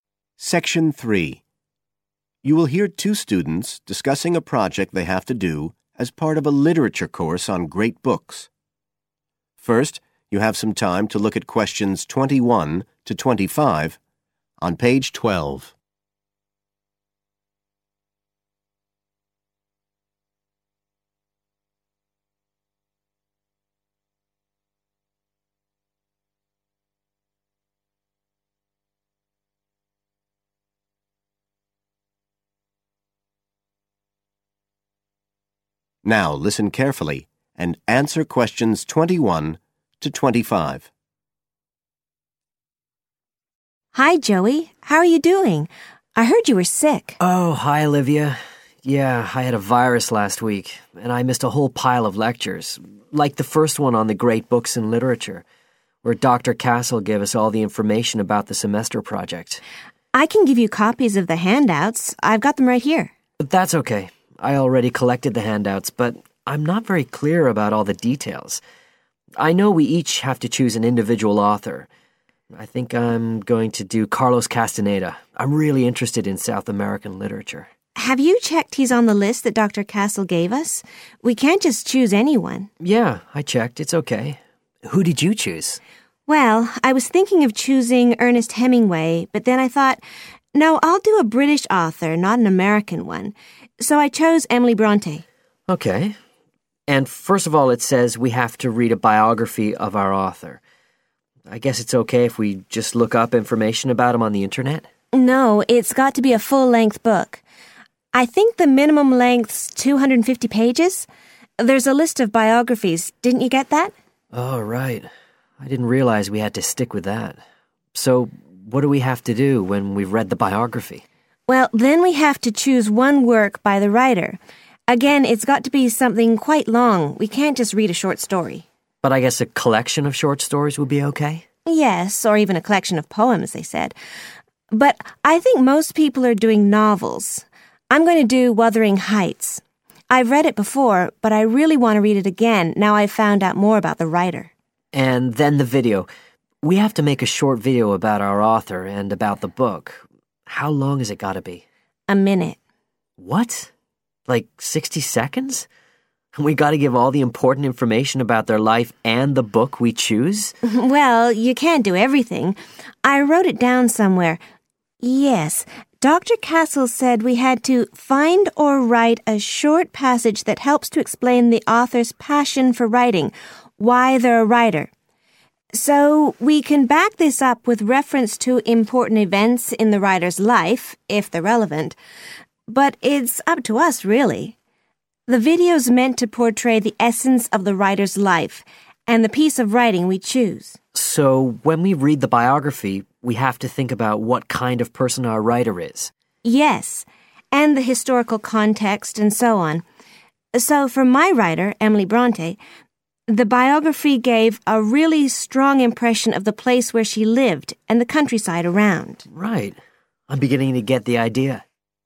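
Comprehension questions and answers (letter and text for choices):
Write the correct letter A, B or C next to Questions 21-25.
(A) they must do this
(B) they can do this if they want to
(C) they can't do this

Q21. Choose a writer from a list provided ............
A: (A) they must do this

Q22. Get biographical information from the Internet...............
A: (C) they can't do this

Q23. Study a collection of poems .............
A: (B) they can do this if they want to

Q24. Make a one-hour video...............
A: (C) they can't do this

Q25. Refer to key facts in the writer's life ...................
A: (B) they can do this if they want to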